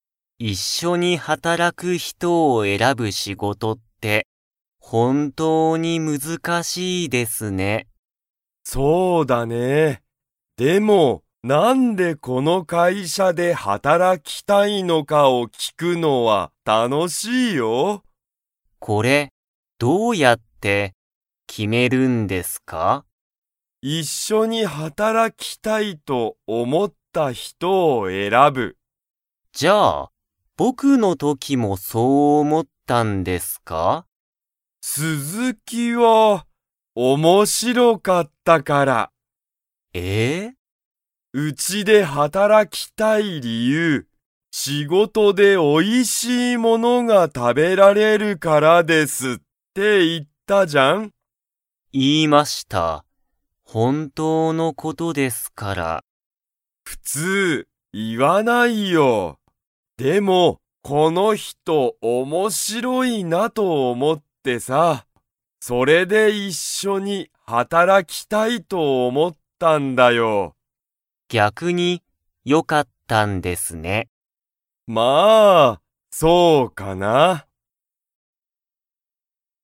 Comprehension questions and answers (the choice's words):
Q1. 佐藤(さとう)さんは、一緒いっしょに働はたらく人ひとを選えらぶ仕事しごとは難むずかしいと思おもいますか?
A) はい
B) いいえ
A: はい

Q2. 佐藤(さとう)さんは、鈴木(すずき)さんのことを、____と思(おも)った。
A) 嬉(うれ)しい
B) つまらない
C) 面白(おもしろ)い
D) かわいい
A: 面白(おもしろ)い

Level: Level 2